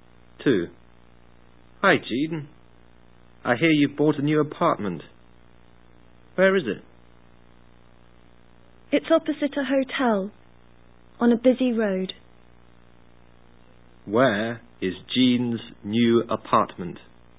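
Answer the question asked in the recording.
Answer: Opposite a hotel, on a busy road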